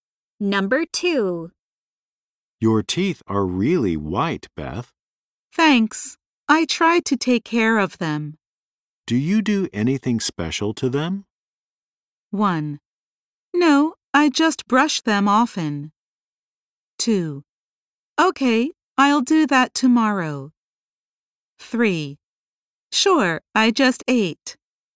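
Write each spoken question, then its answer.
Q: Do you do anything special to them?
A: 1: No, I just brush them often.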